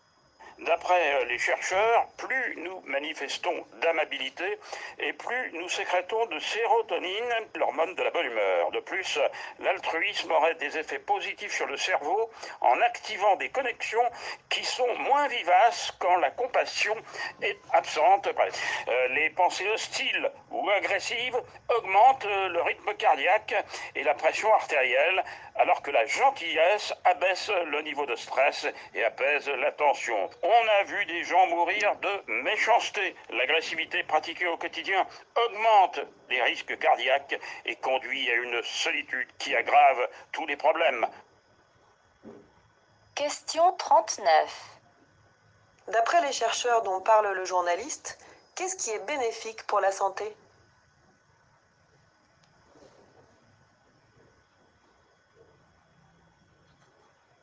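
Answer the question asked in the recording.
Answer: La gentillesse (l'amabilité, l'altruisme)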